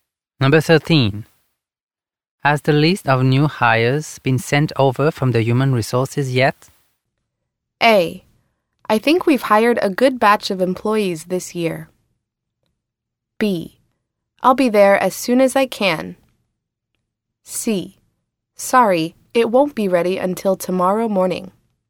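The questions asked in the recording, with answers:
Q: Has the list of new hires been sent over from the Human Resources yet?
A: C: Sorry, it won't be ready until tomorrow morning.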